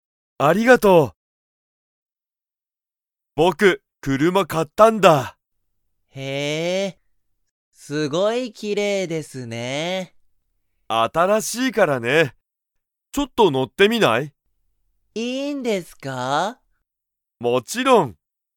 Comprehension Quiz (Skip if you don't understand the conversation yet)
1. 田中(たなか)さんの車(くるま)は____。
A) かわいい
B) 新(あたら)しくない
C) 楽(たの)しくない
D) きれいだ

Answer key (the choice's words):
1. きれいだ

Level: Level 1